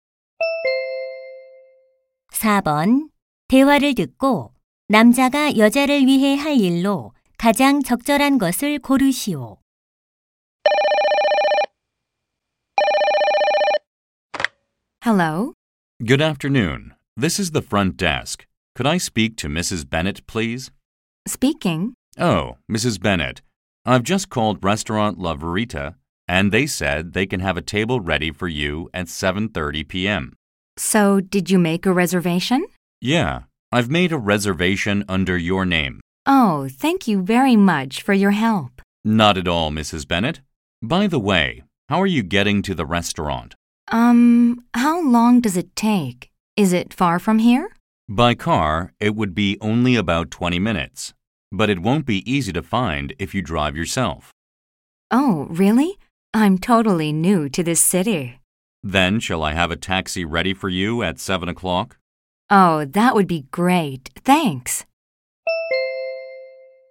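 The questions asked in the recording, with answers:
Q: 대화를 듣고 남자가 여자를 위해 할 일로 가장 적절한 것을 고르시오.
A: 7시에 택시를 준비해 두기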